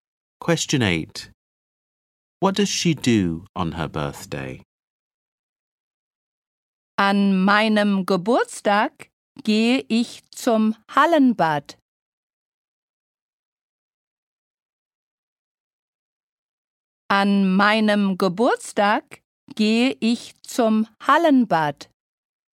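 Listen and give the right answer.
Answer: She goes to the indoor swimming pool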